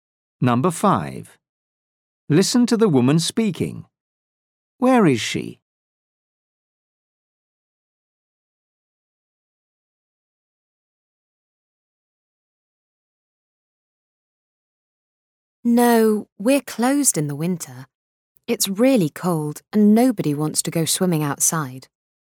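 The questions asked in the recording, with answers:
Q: Where is she?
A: at an outdoor swimming pool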